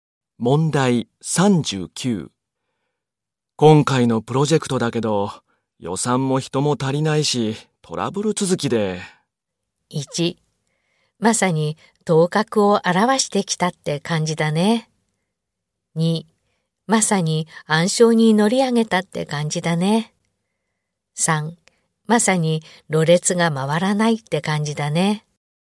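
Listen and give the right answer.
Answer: 2: まさに暗礁に乗り上げたって感じだね。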